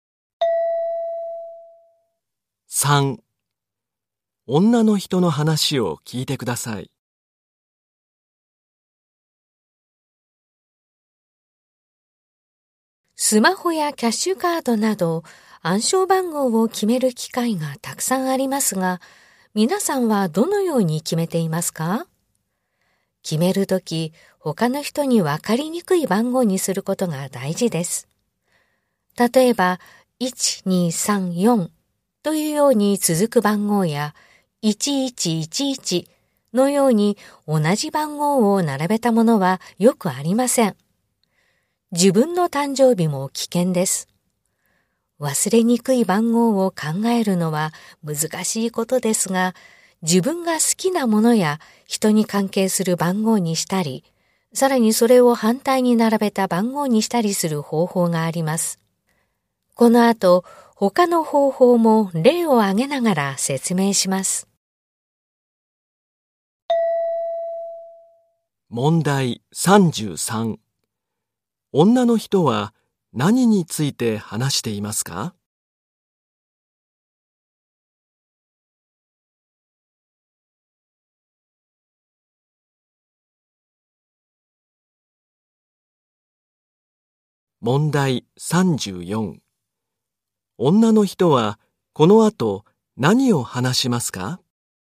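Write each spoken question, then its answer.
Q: 女の人は何について話していますか?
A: 暗証番号の決め方

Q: 女の人はこの後何を話しますか?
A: 暗証番号を決める他の方法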